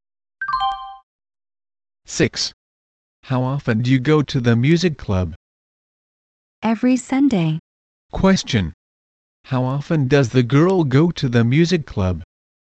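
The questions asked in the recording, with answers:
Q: How often does the girl go to the music club?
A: Every Sunday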